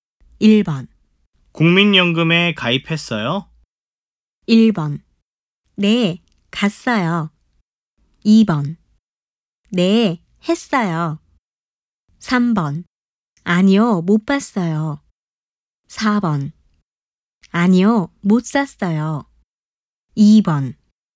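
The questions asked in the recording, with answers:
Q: 국민연금에 가입했어요?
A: 2번: 네, 했어요.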